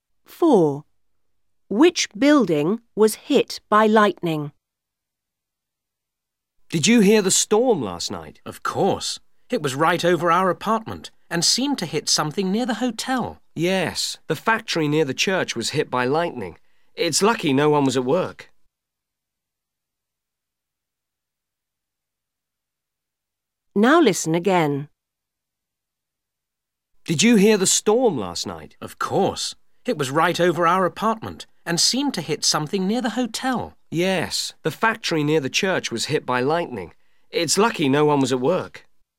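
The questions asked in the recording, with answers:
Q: Which building was hit by lightning?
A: The factory near the church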